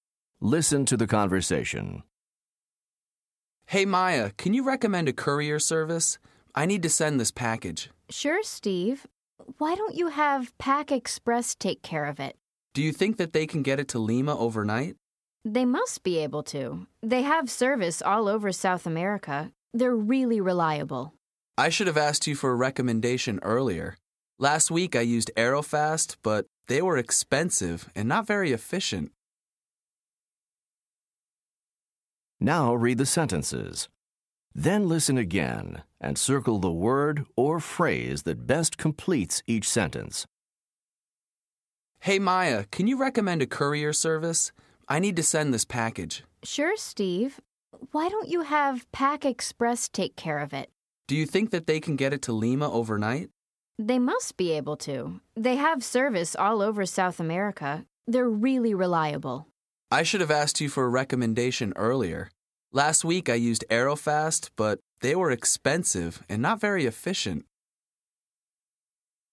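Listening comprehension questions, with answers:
Listen to the conversation. Then choose the word or phrase that completes each sentence correctly.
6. Steve asks Maya for ......... .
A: a recommendation

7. Steve needs the package to arrive ........ .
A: overnight

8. Maya tells Steve that Pack Express is .......... .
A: reliable

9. Pack Express delivers all over ........... .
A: South America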